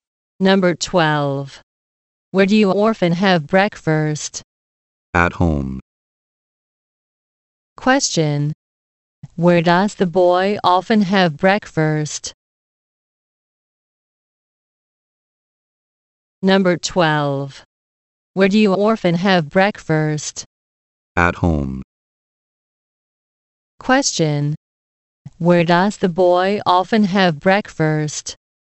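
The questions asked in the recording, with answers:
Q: Question. Where does the boy often have breakfast?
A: At home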